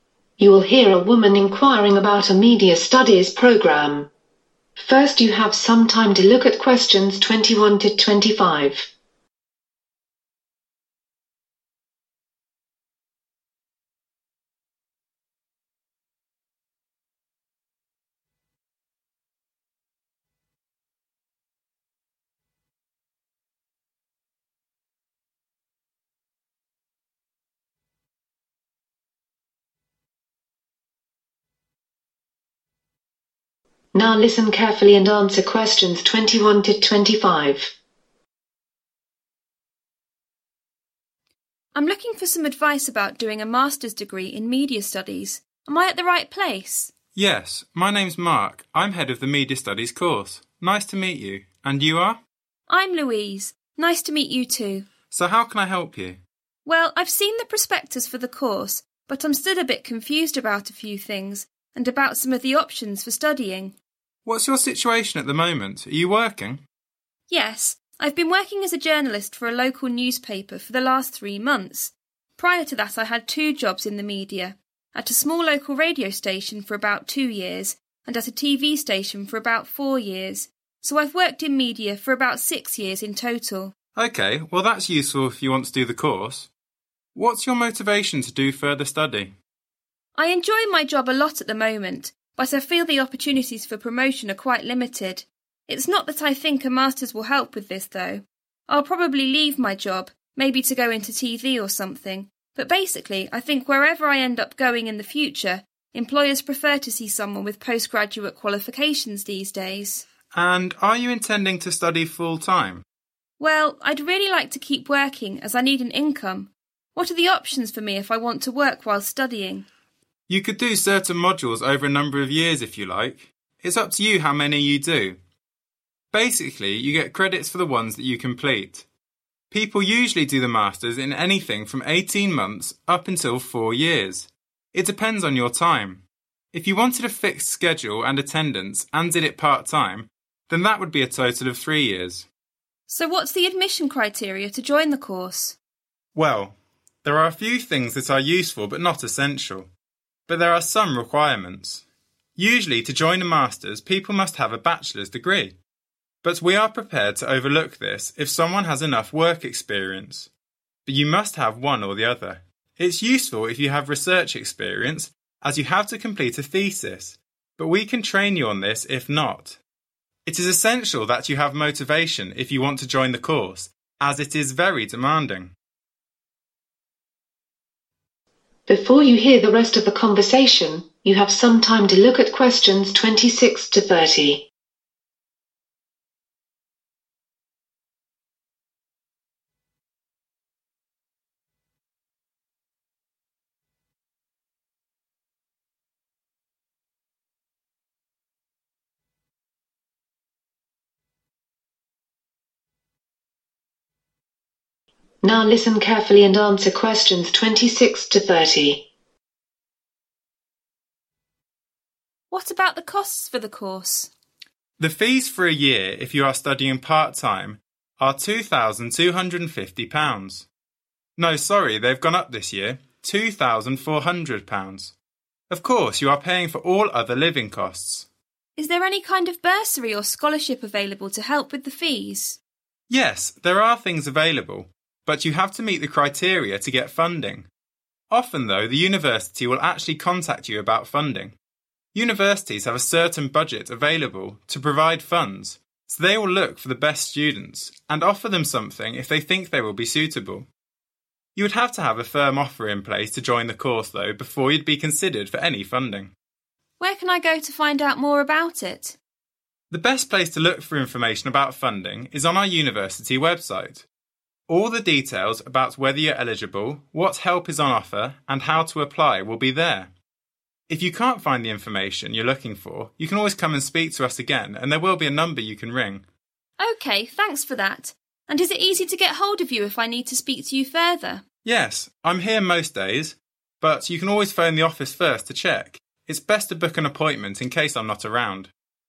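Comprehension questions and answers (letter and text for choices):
Choose the correct letterA, B or C.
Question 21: How long did Louise work at a radio station?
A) 2 years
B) 4 years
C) 6 years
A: A) 2 years

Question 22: Why does Louise want to do a Masters?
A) To get a promotion in her current job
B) To go into TV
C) Employers like post-graduate qualifications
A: C) Employers like post-graduate qualifications

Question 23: How long will it take to do the Masters part-time rather than the modular route?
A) 18 months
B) 3 years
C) 4 years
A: B) 3 years

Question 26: The fees are (26)............... per year to do the course part-time.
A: £2,400

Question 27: The university has a (27).............. it can use to fund the most suitable students.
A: budget

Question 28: You must have a (28)............ in place before you can get any funding.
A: firm offer

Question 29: The details on funding can be found on the (29)............ 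.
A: university website

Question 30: That will also have information on eligibility, help available, and (30).......... .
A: how to apply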